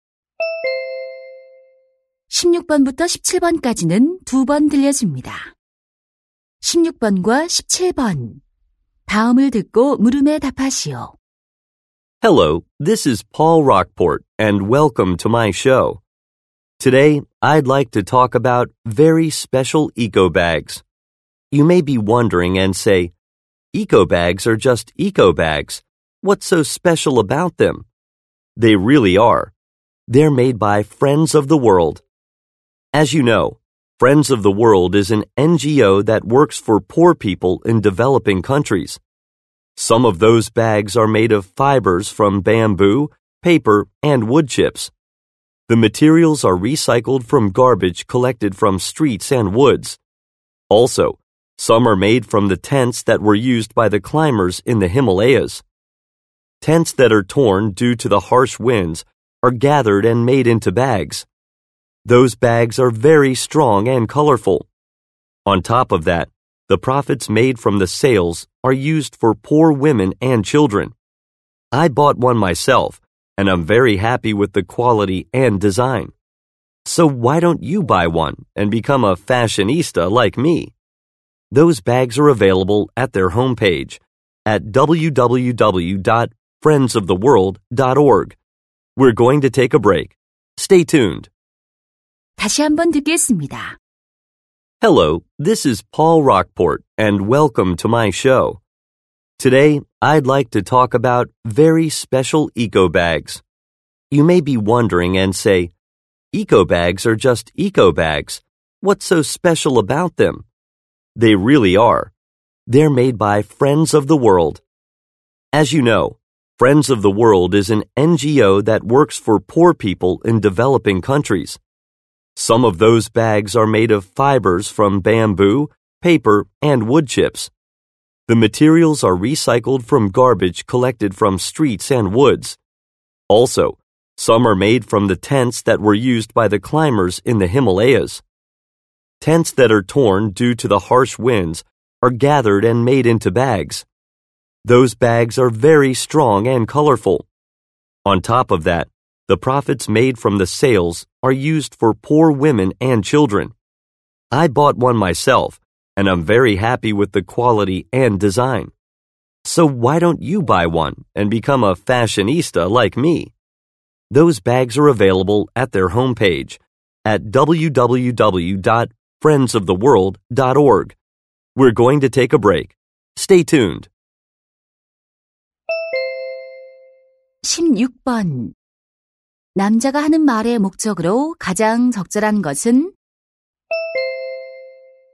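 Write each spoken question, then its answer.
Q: 남자가 하는 말의 목적으로 가장 적절한 것은?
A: 특별한 에코백 구매를 권장하기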